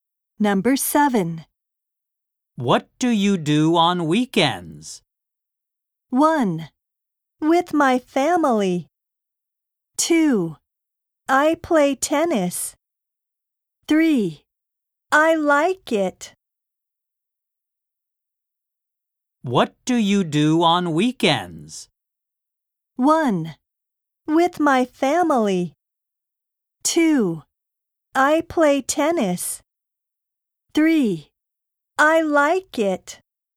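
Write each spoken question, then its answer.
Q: What do you do on weekends?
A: 2: I play tennis.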